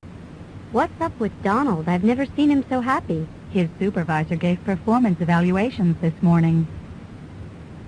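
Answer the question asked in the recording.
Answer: He got a good performance evaluation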